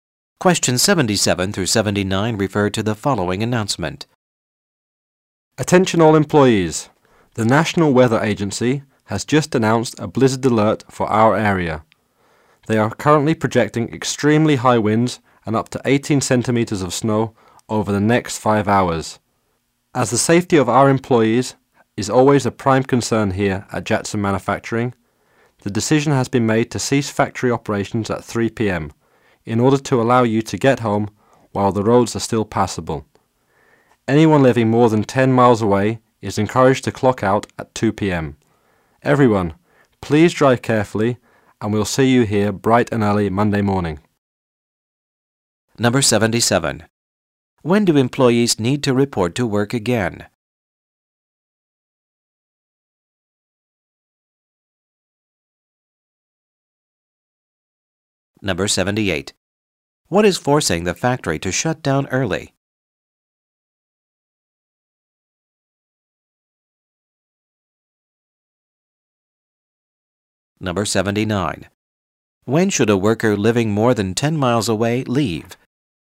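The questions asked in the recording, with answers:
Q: When do employees need to report to work again?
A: Monday morning

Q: What is forcing the factory to shut down early?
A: A blizzard

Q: When should a worker living more than 10 miles away leave?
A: At 2 p.m.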